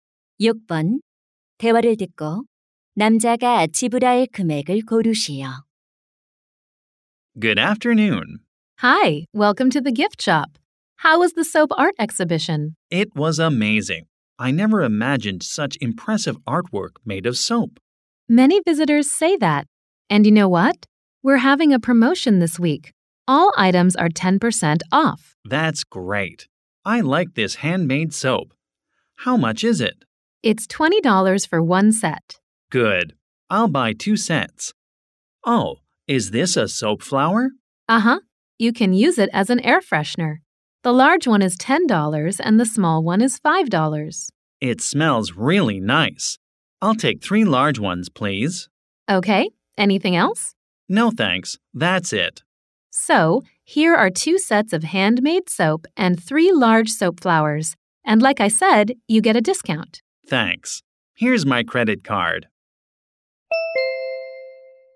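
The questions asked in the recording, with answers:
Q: 대화를 듣고 남자가 지불할 금액을 고르시오.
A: $63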